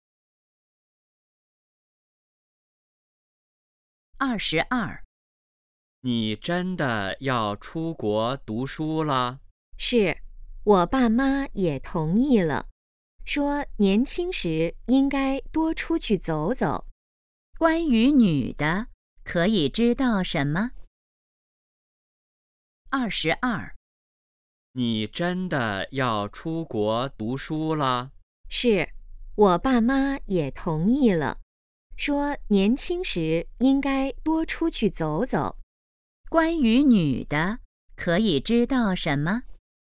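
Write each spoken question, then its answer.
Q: 关于女的,可以知道什么?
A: 她要出国读书了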